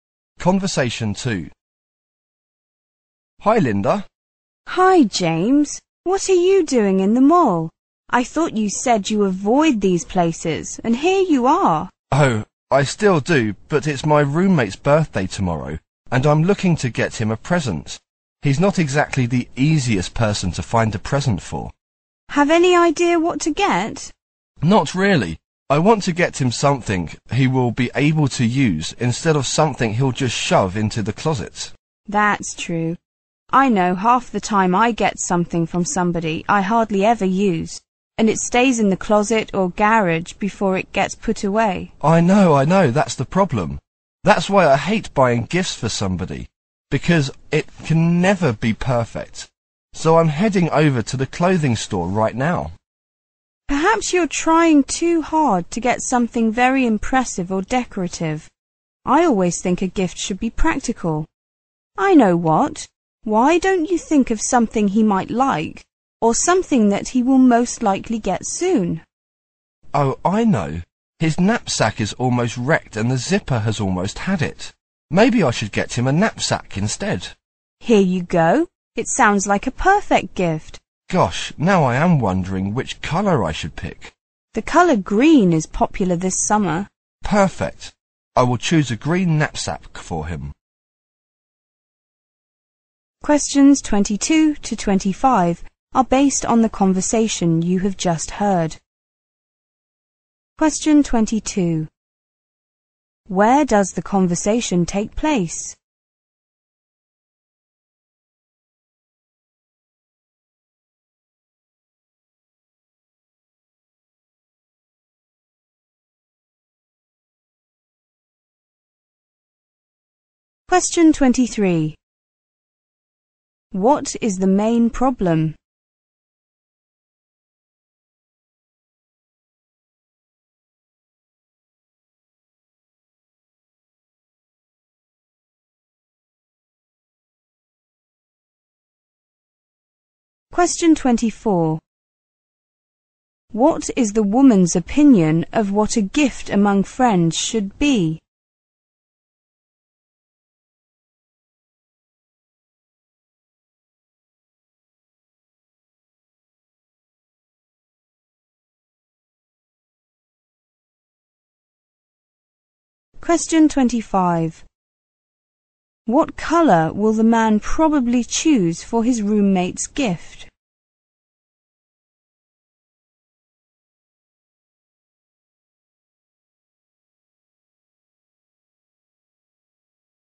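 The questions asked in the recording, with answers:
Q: Where does the conversation take place?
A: In a mall

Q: What is the main problem?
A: The man doesn't know what birthday present to buy for his roommate

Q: What is the woman's opinion of what a gift among friends should be?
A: It should be practical

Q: What colour will the man probably choose for his roommate's gift?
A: Green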